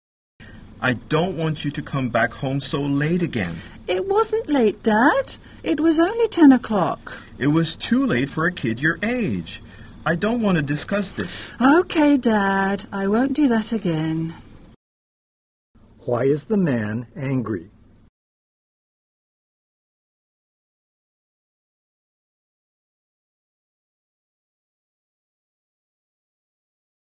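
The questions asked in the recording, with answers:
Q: Why is the man angry?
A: His child came home too late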